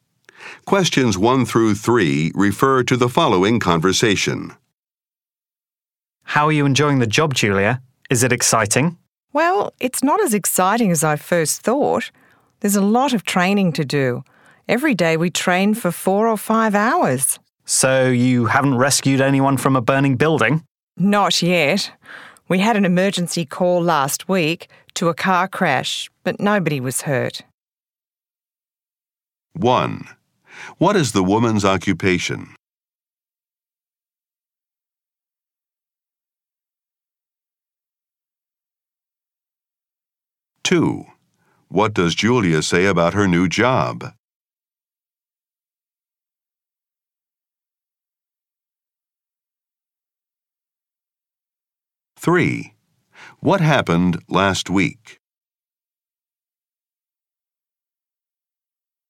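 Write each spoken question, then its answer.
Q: What is the woman's occupation?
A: Firefighter

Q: What does Julia say about her new job?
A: It is not as exciting as she thought; there's a lot of training

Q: What happened last week?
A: They had an emergency call to a car crash, but nobody was hurt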